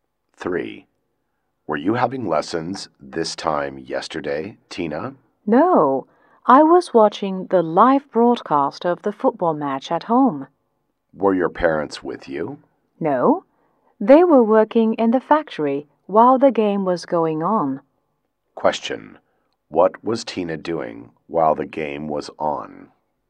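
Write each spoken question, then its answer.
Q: what was Tina doing while the game was on?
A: Watching the live broadcast at home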